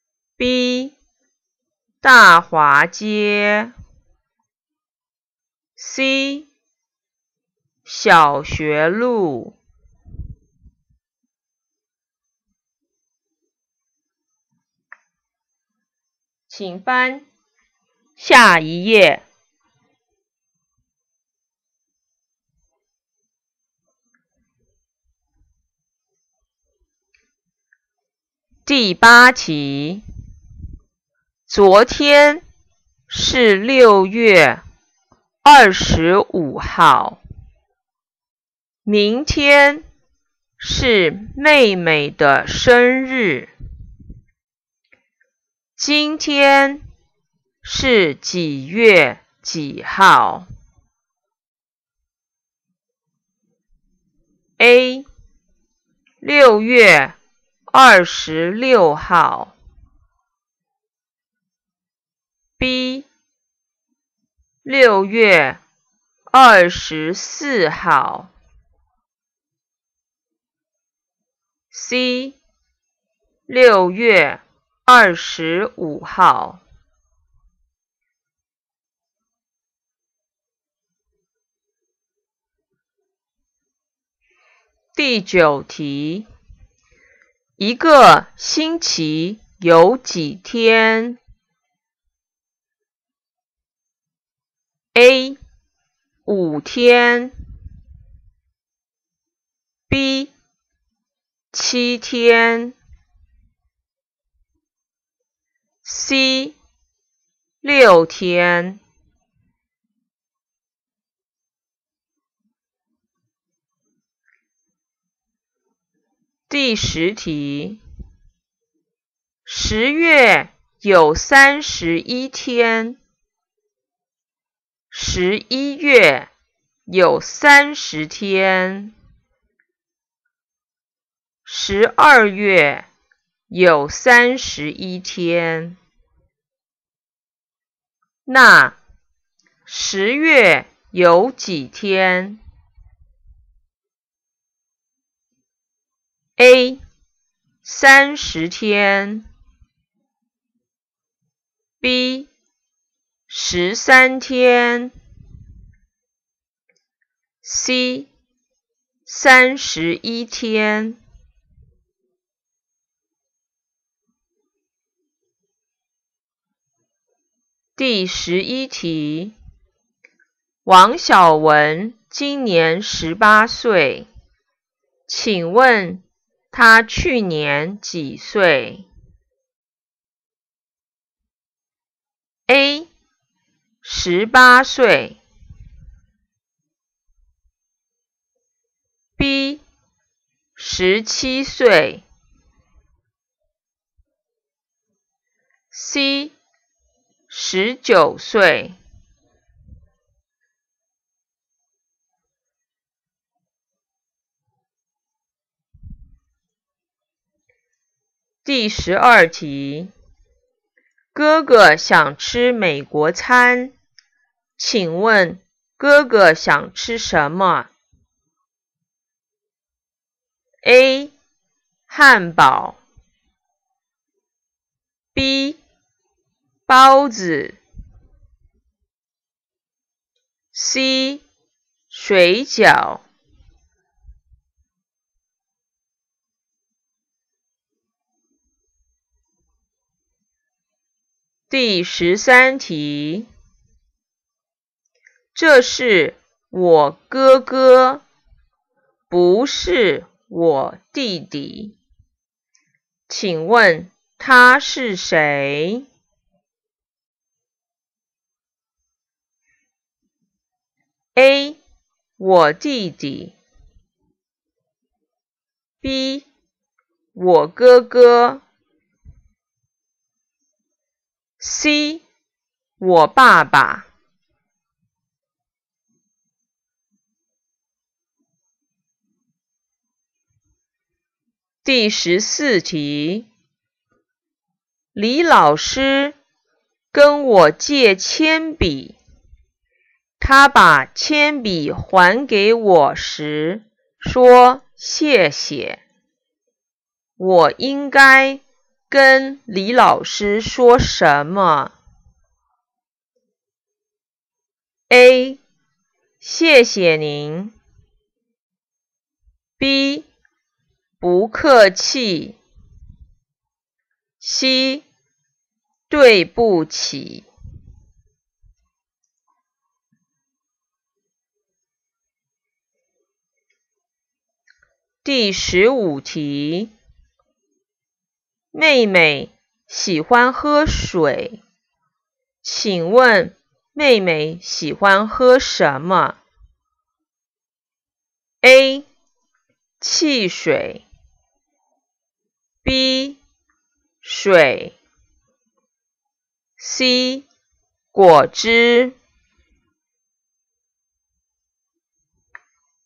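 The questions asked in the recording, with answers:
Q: 今天是几月几号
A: A: 6月26号

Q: 一个星期有几天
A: B: 7天

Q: 那10月有几天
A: C: 31天

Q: 请问他去年几岁 ?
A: B: 17岁

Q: 请问哥哥想吃什么 ?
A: A: 汉堡

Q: 请问他是谁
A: B: 我哥哥

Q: 我应该跟李老师说什么?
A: B: 不客气。

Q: 请问妹妹喜欢喝什么?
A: B: 水。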